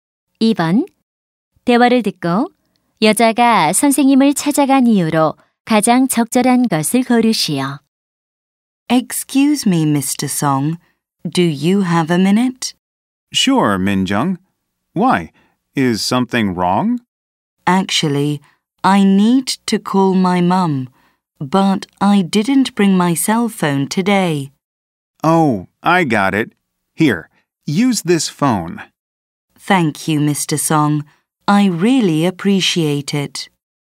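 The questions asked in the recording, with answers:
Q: 대화를 듣고 여자가 선생님을 찾아간 이유로 가장 적절한 것을 고르시오.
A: 엄마에게 전화하려고 전화기를 빌리려고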